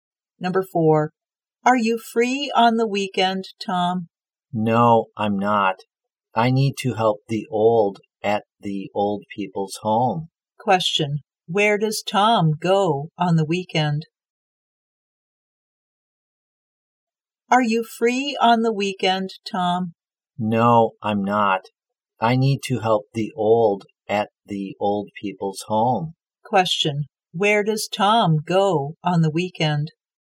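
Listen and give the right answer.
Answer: The old people's home.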